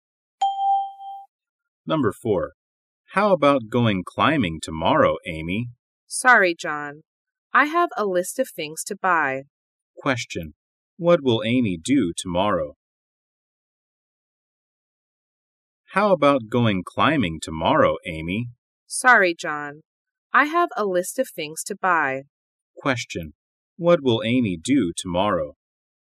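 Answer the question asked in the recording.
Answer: Go shopping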